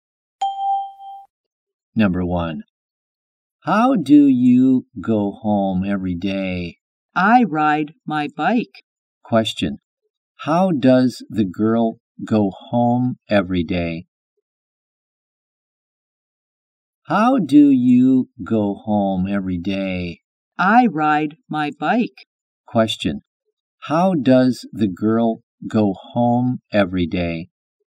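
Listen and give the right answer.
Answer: She rides her bike.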